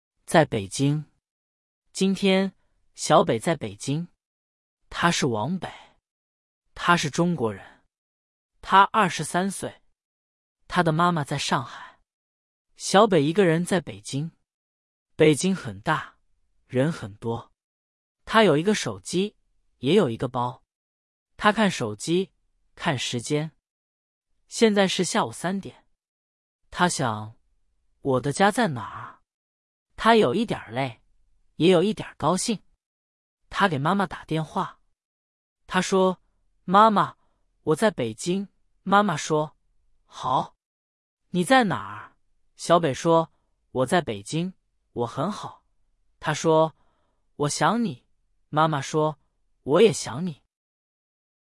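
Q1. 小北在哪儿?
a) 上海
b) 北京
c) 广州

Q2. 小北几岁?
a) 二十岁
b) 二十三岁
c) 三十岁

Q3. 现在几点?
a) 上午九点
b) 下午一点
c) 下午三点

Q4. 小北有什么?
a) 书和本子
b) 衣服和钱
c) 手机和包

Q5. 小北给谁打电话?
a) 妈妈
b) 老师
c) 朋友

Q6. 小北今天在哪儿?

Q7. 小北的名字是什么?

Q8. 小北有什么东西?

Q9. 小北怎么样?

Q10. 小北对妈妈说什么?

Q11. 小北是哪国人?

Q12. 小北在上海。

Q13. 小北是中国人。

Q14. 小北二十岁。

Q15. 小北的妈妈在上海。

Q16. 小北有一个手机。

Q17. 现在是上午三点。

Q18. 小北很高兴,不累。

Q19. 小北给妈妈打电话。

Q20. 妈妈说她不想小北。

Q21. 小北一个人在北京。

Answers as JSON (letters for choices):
{"1": "b", "2": "b", "3": "c", "4": "c", "5": "a", "6": "在北京", "7": "王北", "8": "一个手机和一个包", "9": "有一点儿累,也有一点儿高兴", "10": "我在北京,我很好,我想你", "11": "中国人", "12": "错", "13": "对", "14": "错", "15": "对", "16": "对", "17": "错", "18": "错", "19": "对", "20": "错", "21": "对"}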